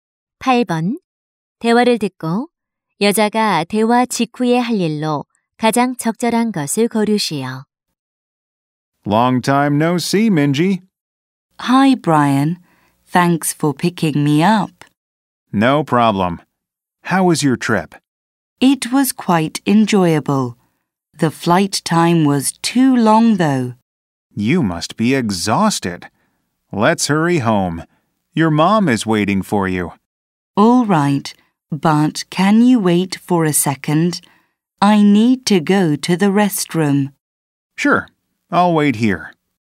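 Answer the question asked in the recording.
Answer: 화장실 가기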